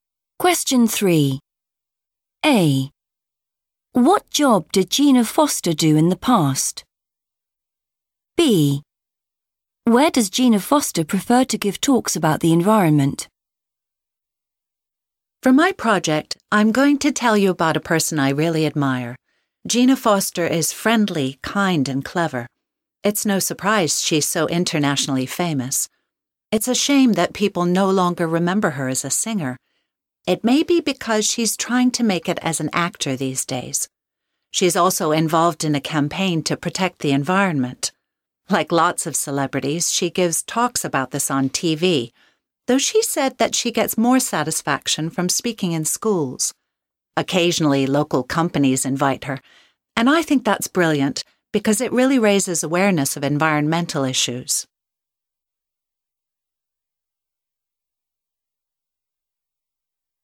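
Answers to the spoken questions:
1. singer
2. in schools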